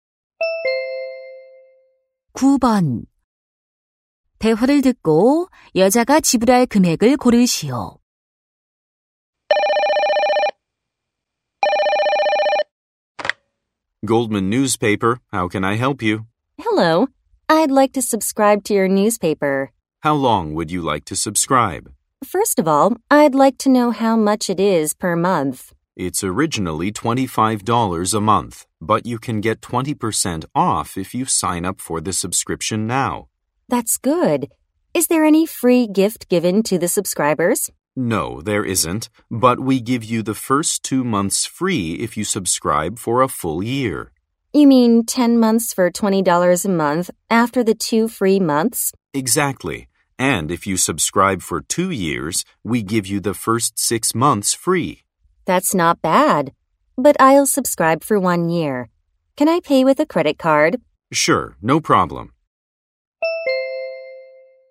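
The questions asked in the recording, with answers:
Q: 대화를 듣고 여자가 지불할 금액을 고르시오.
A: 200달러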